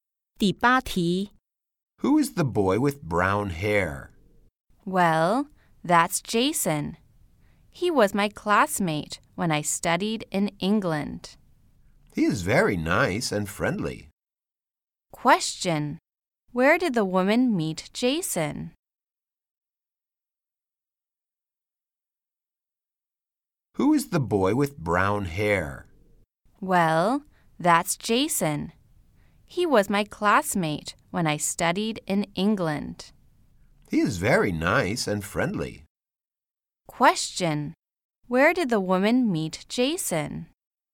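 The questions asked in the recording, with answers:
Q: Where did the woman meet Jason?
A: In England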